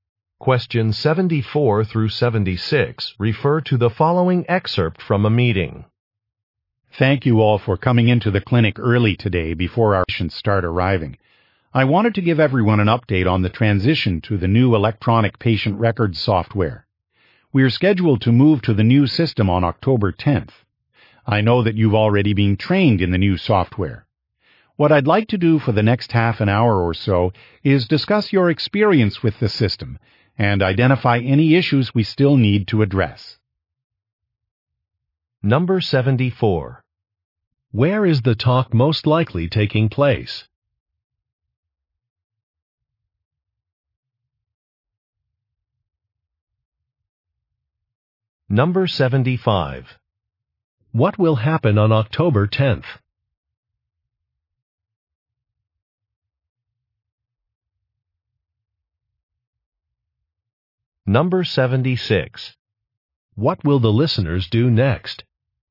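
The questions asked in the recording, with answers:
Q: Where is the talk most likely taking place?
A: At a clinic

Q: What will happen on October 10th?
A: The clinic will switch to new electronic patient records software

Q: What will the listeners do next?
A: Discuss their experience with the new system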